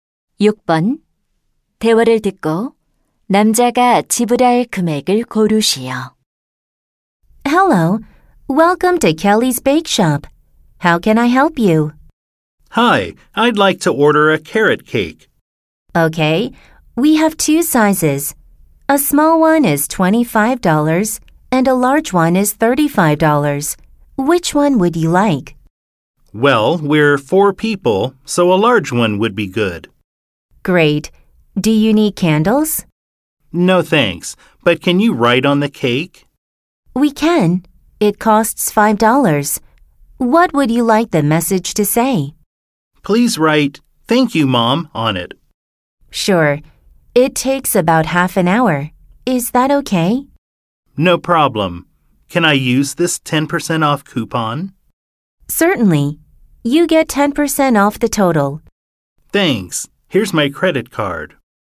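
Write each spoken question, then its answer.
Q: 대화를 듣고 남자가 지불할 금액을 고르시오.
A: $36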